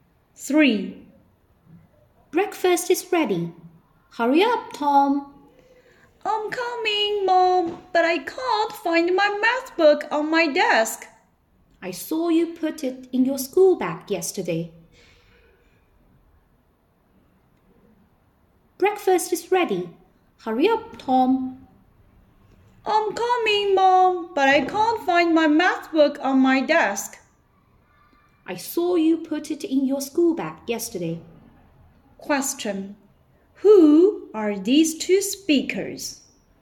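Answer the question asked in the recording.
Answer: Mother and son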